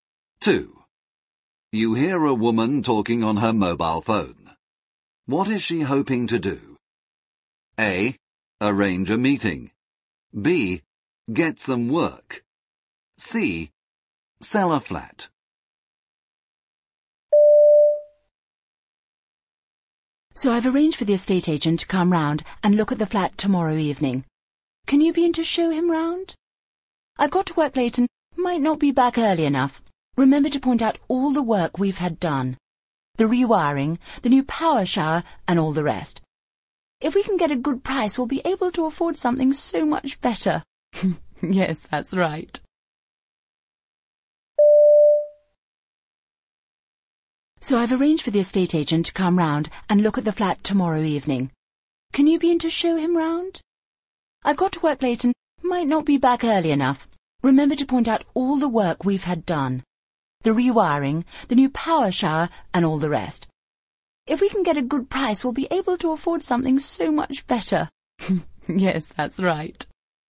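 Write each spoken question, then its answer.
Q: What is she hoping to do?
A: C: Sell a flat.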